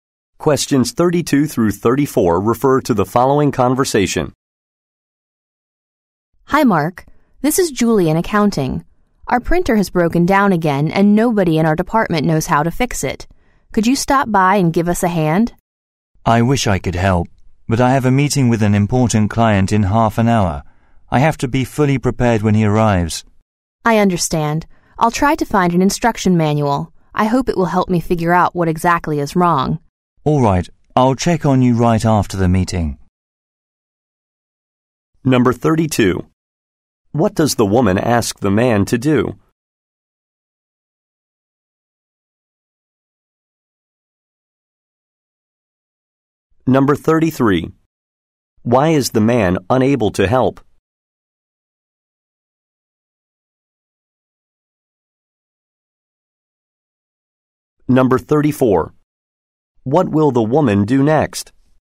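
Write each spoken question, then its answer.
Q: What does the woman ask the man to do?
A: Help fix a broken printer

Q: Why is the man unable to help?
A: He has a meeting with an important client soon

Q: What will the woman do next?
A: Look for an instruction manual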